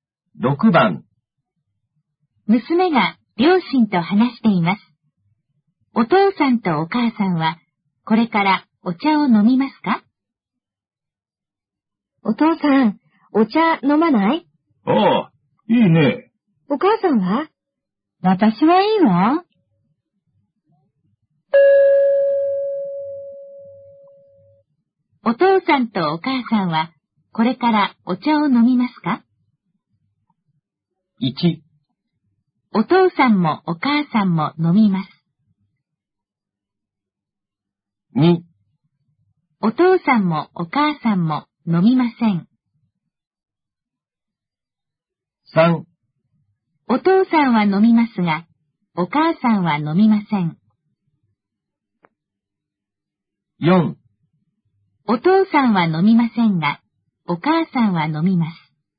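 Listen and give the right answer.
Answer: 3: お父さんは飲みますが、お母さんは飲みません。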